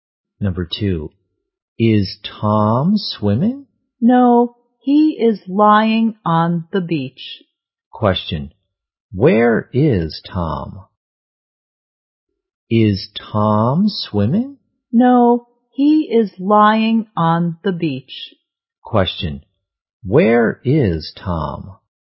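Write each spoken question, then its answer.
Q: where is Tom?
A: On the beach.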